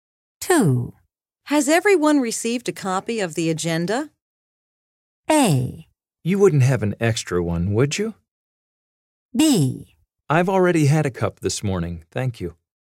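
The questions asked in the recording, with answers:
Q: Has everyone received a copy of the agenda?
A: A: You wouldn't have an extra one, would you?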